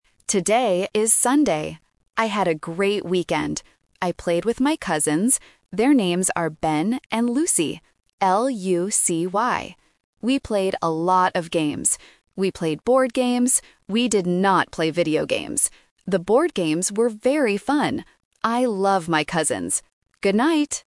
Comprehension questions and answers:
Listen to a student's audio diary. Choose the correct answer (A, B, or C) for each question.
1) Who did the student play with this weekend?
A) His friends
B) His cousins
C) His grandparents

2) What is the girl cousin's name?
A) Lily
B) Lucy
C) Daisy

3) What did they play?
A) Video games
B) Board games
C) Football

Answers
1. B) His cousins
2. B) Lucy
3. B) Board games

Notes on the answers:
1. The student clearly says, "I played with my cousins." Option A (friends) is a plausible guess for a weekend activity but is not mentioned. Option C (grandparents) is another extended family word used as a distractor.
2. The student spells the name clearly: L-U-C-Y. Option A (Lily) is a phonetic trap because it sounds very similar and starts with an L. Option C (Daisy) is just a plausible wrong name.
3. The student says, "We played board games." Option A (Video games) is the main trap because the student explicitly says, "We did not play video games." Option C (Football) is never mentioned.

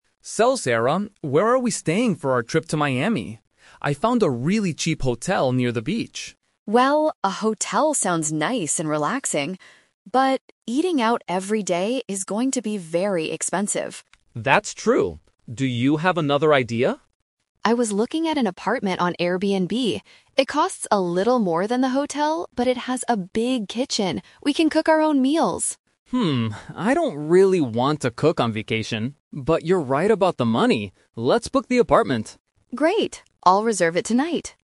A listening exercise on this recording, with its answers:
Listen to the conversation between two friends planning a vacation and choose the correct answer (A, B, or C) for each question.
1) What did Mark initially find for their trip?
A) A cheap hotel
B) An expensive restaurant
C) A big apartment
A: A) A cheap hotel

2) Why does Sarah prefer not to stay at the hotel?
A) It is too far from the beach.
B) Eating at restaurants will cost a lot of money.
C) The hotel room is too expensive.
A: B) Eating at restaurants will cost a lot of money.

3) What do they finally decide to do?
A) Look for a cheaper hotel.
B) Eat out every day.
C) Rent the apartment.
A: C) Rent the apartment.

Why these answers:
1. At the beginning of the conversation, Mark clearly says, "I found a really cheap hotel near the beach."
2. Sarah says, "But, eating out every day is going to be very expensive." This is her main reason for not wanting the hotel.
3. This is where the "Twist" happens. Even though Mark doesn't want to cook, he agrees with Sarah about saving money. He says, "Let's book the apartment," and Sarah confirms, "I'll reserve it tonight."

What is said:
Mark: So, Sarah, where are we staying for our trip to Miami? I found a really cheap hotel near the beach.
Sarah: Well, a hotel sounds nice and relaxing. But, eating out every day is going to be very expensive.
Mark: That's true. Do you have another idea?
Sarah: I was looking at an apartment on Airbnb. It costs a little more than the hotel, but it has a big kitchen. We can cook our own meals!
I don't really want to cook on vacation. But you're right about the money. Let's book the apartment.

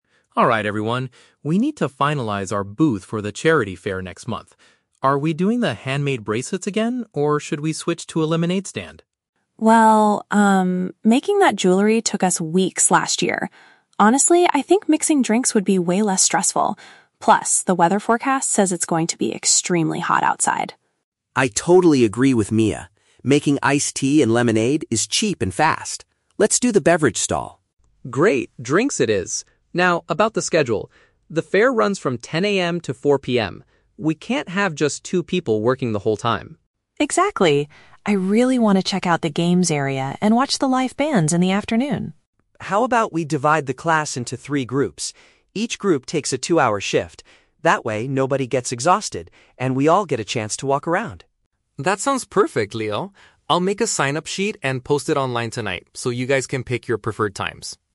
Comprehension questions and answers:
Listen to a conversation between a class president and two classmates planning for a charity fair. Choose the correct answer (A, B, or C) for each question.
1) What does the class ultimately decide to sell at the charity fair?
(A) Handmade accessories.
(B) Cold refreshments.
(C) Sweet baked goods.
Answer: (B) Cold refreshments.

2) Why does Mia prefer the new booth idea over last year's activity?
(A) She believes it will attract a lot more customers.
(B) She thinks it requires much less preparation time and effort.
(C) She already bought all the necessary ingredients.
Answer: (B) She thinks it requires much less preparation time and effort.

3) How will they organize the work so that everyone can enjoy the festival?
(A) By taking turns working in short time periods.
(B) By hiring outside helpers to manage the booth.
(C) By closing their stall early to watch the live music.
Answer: (A) By taking turns working in short time periods.

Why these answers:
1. The class agrees to do a "beverage stall" making "iced tea and lemonade." Option (B) uses a synonym ("cold refreshments" = iced tea/lemonade/drinks). Option (A) is a trap; "handmade bracelets" and "jewelry" are mentioned, but they reject this idea because it took too long last year. Option (C) is never mentioned.
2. Mia says making jewelry took them "weeks" and that mixing drinks would be "way less stressful," while Leo adds it is "cheap and fast." Option (B) accurately paraphrases this idea. Option (A) is a plausible guess for a charity fair, but it is not Mia's stated reason. Option (C) is a trap; ingredients are not mentioned as already bought.
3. Leo suggests dividing into groups where each takes a "two-hour shift" so everyone gets a chance to walk around. Option (A) paraphrases this perfectly ("taking turns" = dividing into shifts, "short time periods" = two hours). Option (B) is a trap; they are not hiring anyone, they are dividing the class. Option (C) is a trap; Mia wants to watch the "live bands," but they do not close the stall early to do so (they cover the whole 10 AM to 4 PM time).

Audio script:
Sam (Class President): Alright everyone, we need to finalize our booth for the charity fair next month. Are we doing the handmade bracelets again, or should we switch to a lemonade stand?
Mia: Well, um, making that jewelry took us weeks last year. Honestly, I think mixing drinks would be way less stressful. Plus, the weather forecast says it's going to be extremely hot outside.
Leo: I totally agree with Mia. Making iced tea and lemonade is cheap and fast. Let's do the beverage stall.
Sam: Great, drinks it is! Now, about the schedule. The fair runs from 10 AM to 4 PM. We can't have just two people working the whole time.
Mia: Exactly. I really want to check out the games area and watch the live bands in the afternoon.
Leo: How about we divide the class into three groups? Each group takes a two-hour shift. That way, nobody gets exhausted, and we all get a chance to walk around.
Sam: That sounds perfect, Leo. I'll make a sign-up sheet and post it online tonight so you guys can pick your preferred times.

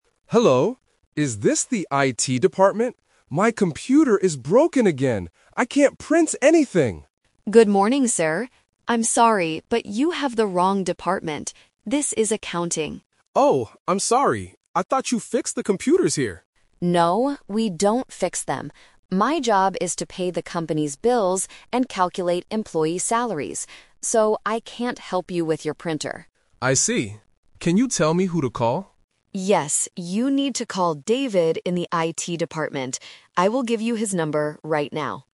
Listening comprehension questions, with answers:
Listen to a phone call in a company. Circle the correct answer (A, B, or C).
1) What is the customer's problem?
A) He didn't get his salary.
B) His computer is broken.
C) He lost David's phone number.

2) What is Jessica's actual job?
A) She fixes broken computers.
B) She answers all the phone calls.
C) She pays bills and calculates salaries.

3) Who does the customer need to talk to?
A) Jessica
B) David in the IT department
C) The company manager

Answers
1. B) His computer is broken.
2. C) She pays bills and calculates salaries.
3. B) David in the IT department

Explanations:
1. Mr. Smith says, "My computer is broken again." Option (A) is a trap because the word "salaries" is mentioned by Jessica as part of her job, not as the customer's problem. Option (C) is a plausible issue, but it is not mentioned.
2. Jessica clearly explains her job: "My job is to pay the company's bills and calculate employee salaries." Option (A) is the trap: Mr. Smith thought she fixed computers, but she says "we don't fix them." Option (B) is a plausible office job, but it is not what she does.
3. Jessica tells the customer, "...you need to call David in the IT department." Option (A) is the trap because he is currently talking to Jessica, but she can't help him. Option (C) is a plausible person to call in a company, but the manager is not mentioned in the audio.

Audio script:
Smith: Hello, is this the IT department? My computer is broken again. I can't print anything!
Jessica: Good morning, sir. I'm sorry, but you have the wrong department. This is Accounting.
Mr. Smith: Oh, I'm sorry! I thought you fixed the computers here.
Jessica: No, we don't fix them. My job is to pay the company's bills and calculate employee salaries. So, I can't help you with your printer.
Mr. Smith: I see. Can you tell me who to call?
Jessica: Yes, you need to call David in the IT department. I will give you his number right now.

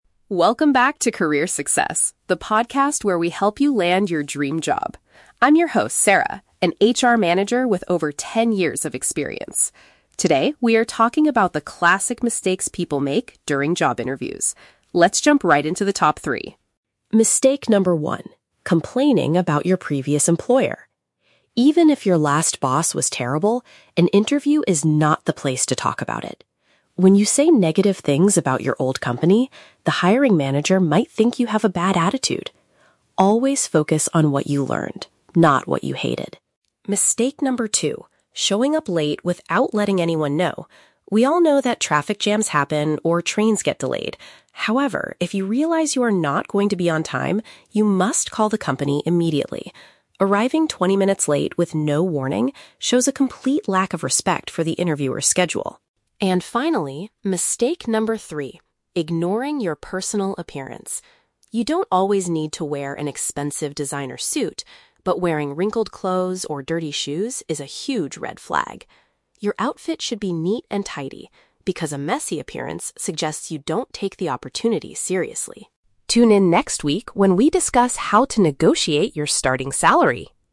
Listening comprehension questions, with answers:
Listen to a podcast hosted by an HR expert. Choose the best answer (A, B, or C) for each question.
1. According to Sarah, why is it a bad idea to speak negatively about a former job?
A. Because the hiring manager might actually know your old boss.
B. Because it gives the impression that you have a problematic personality.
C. Because you will forget to talk about the skills you learned there.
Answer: B. Because it gives the impression that you have a problematic personality.

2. What should a candidate do if an unexpected transportation delay occurs?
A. Contact the employer right away to inform them of the situation.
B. Apologize profoundly when they finally arrive at the office.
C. Return home and send an email to reschedule the interview.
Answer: A. Contact the employer right away to inform them of the situation.

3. What does a sloppy or messy outfit indicate to a hiring manager?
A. The candidate does not have enough money to buy professional clothes.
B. The candidate is applying for a very casual and creative position.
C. The candidate does not care enough about the job offer.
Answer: C. The candidate does not care enough about the job offer.

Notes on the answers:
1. Sarah states that if you say negative things, the hiring manager might "think you have a bad attitude." Paraphrasing: give the impression = think; problematic personality = bad attitude.
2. Sarah advises that if you are not going to be on time, you must "call the company immediately." Paraphrasing: call = contact; immediately = right away; company = employer.
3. Sarah says a messy appearance "suggests you don't take the opportunity seriously." Paraphrasing: job offer = opportunity; do not care enough = do not take it seriously.

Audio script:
Sarah (Podcast Host): Welcome back to Career Success, the podcast where we help you land your dream job. I'm your host, Sarah, an HR manager with over ten years of experience. Today, we are talking about the classic mistakes people make during job interviews. Let's jump right into the top three.
Mistake number one: complaining about your previous employer. Even if your last boss was terrible, an interview is not the place to talk about it. When you say negative things about your old company, the hiring manager might think you have a bad attitude. Always focus on what you learned, not what you hated.
Mistake number two: showing up late without letting anyone know. We all know that traffic jams happen, or trains get delayed. However, if you realize you are not going to be on time, you must call the company immediately. Arriving twenty minutes late with no warning shows a complete lack of respect for the interviewer's schedule.
And finally, mistake number three: ignoring your personal appearance. You don't always need to wear an expensive designer suit, but wearing wrinkled clothes or dirty shoes is a huge red flag. Your outfit should be neat and tidy, because a messy appearance suggests you don't take the opportunity seriously.
Tune in next week when we discuss how to negotiate your starting salary!

